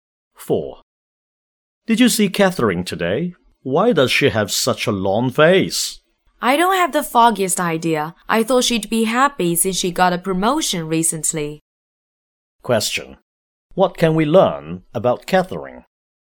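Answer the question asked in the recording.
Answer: She looks unhappy even though she recently got a promotion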